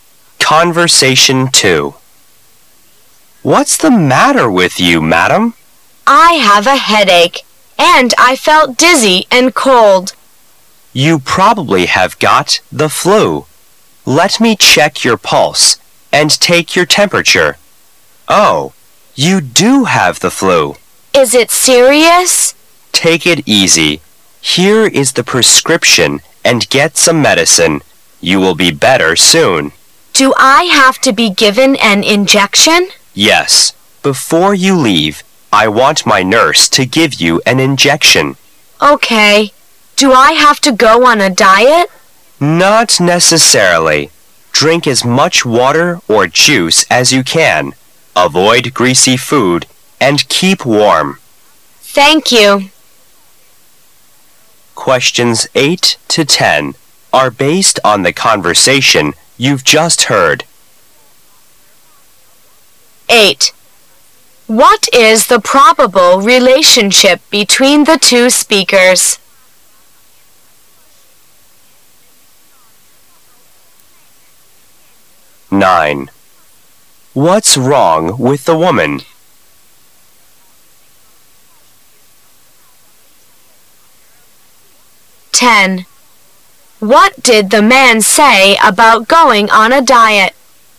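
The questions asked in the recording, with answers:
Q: What is the probable relationship between the two speakers?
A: Doctor and patient

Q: What's wrong with the woman?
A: She has the flu

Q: What did the man say about going on a diet?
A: It's not necessary; drink lots of water or juice and avoid greasy food

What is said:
[解析] 8-10 M: What's the matter with you, madam? W: I have a headache. And I felt dizzy and cold. M: You probably have got the flu. Let me check your pulse and take your temperature. Oh, you do have the flu, W: Is it serious? M: Take it easy. Here is the prescription and get some medicine, you will be better soon. W: Do I have to be given an injection? M: Yes, before you leave, I want my nurse to give you an injection. W: Okay. Do I have to go on a diet? M: Not necessarily. Drink as much water or juice as you can, avoid greasy food and keep warm. W:Thank you.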